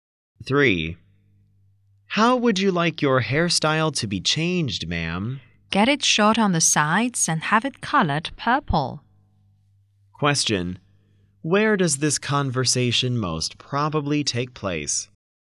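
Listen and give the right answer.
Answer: At a hair salon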